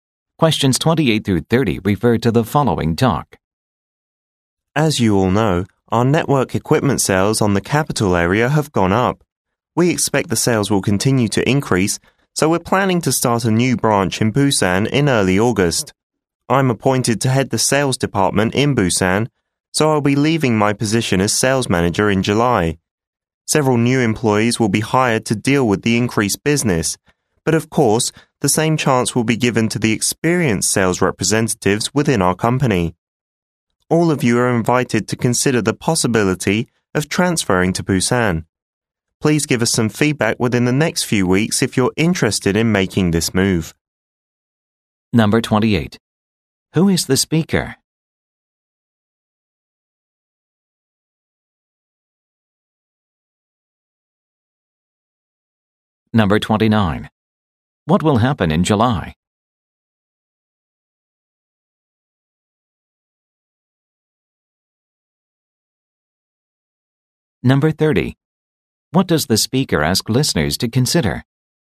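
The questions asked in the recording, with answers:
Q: Who is the speaker?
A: A sales manager

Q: What will happen in July?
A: The speaker will leave the sales manager position

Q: What does the speaker ask listeners to consider?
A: Transferring to Busan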